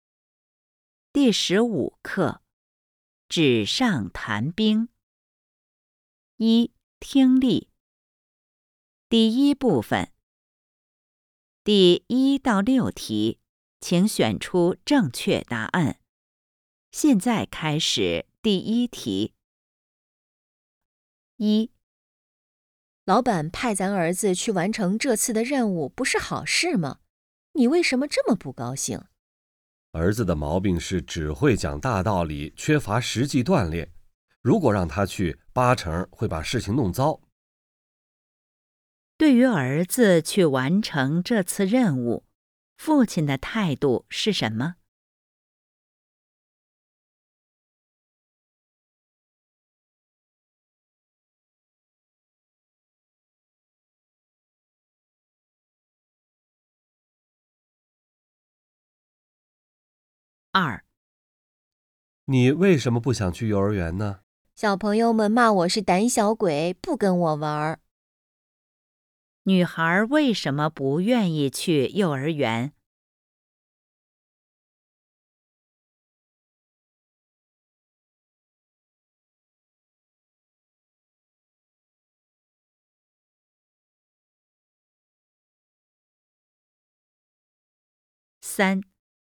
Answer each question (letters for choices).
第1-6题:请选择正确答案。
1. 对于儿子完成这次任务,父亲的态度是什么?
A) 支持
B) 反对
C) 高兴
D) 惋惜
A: B

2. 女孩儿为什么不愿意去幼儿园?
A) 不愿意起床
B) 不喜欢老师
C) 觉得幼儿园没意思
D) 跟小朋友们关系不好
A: D

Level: HSK 5